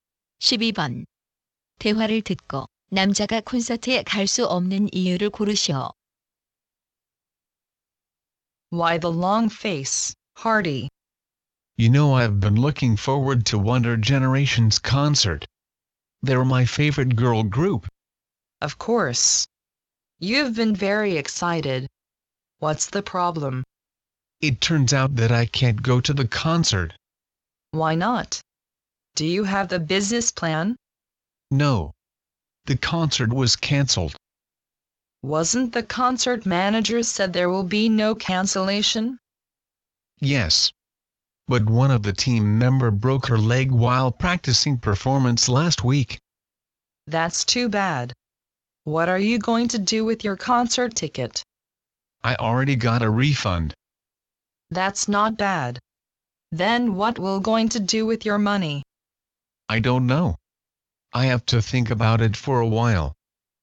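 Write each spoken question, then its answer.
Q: 대화를 듣고 남자가 콘서트에 갈 수 없는 이유를 고르시오.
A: 콘서트가 취소되어서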